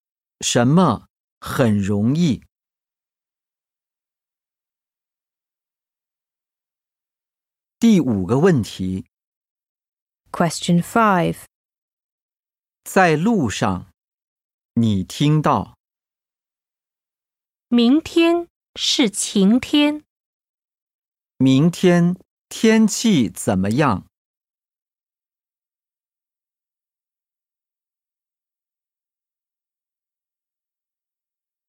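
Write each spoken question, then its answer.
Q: 明天天气怎么样?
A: 晴天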